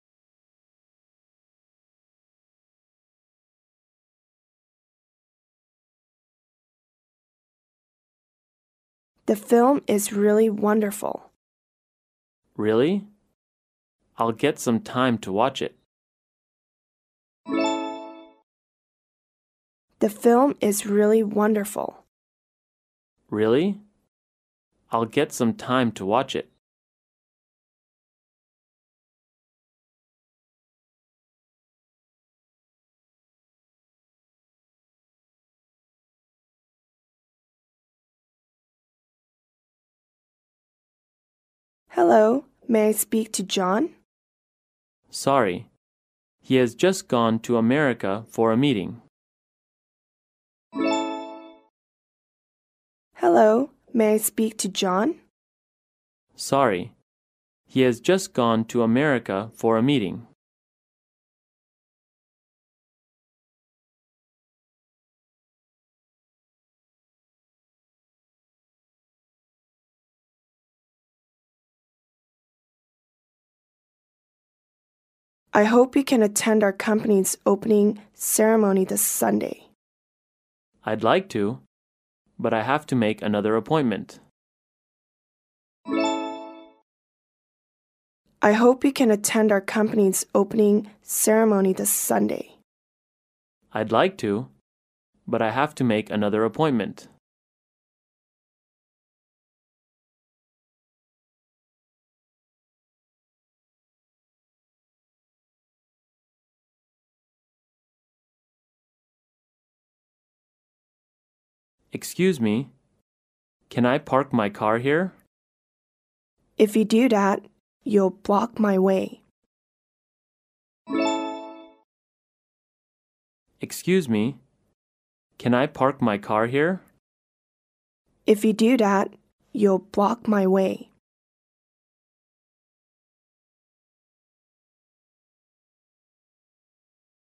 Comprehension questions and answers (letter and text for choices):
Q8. Where is John now?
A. America.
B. China.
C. Canada.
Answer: A. America.

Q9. What does he mean?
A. He will go to the ceremony.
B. He has time.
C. He won't have time to attend the ceremony.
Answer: C. He won't have time to attend the ceremony.

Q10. What does the woman mean?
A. She agrees the man to park his car here.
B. She wants to park her car here.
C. She doesn't allow the man to park his car here.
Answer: C. She doesn't allow the man to park his car here.

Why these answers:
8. [解析] 根据"约翰去美国开会了。"可知答案为A。 [听力原文] W: Hello. May I speak to John? M: Sorry, he has just gone to America for a meeting.
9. [解析] 第一个人邀请第二个人本周日参加他们公司的开幕式,但第二个人回答要赴另一个约会,可以推断出他是说没时间去参加开幕式,所以答案为C。 [听力原文] W: I hope you can attend our company's opening ceremony this Sunday. M: I'd like to, but I have to make another appointment.
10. [解析] 根据"我可以把车停在这吗?""如果那样就会挡住我的路。"可推断出答案为C。 [听力原文] M: Excuse me, can I park my car here? W: If you do that, you'll block my way.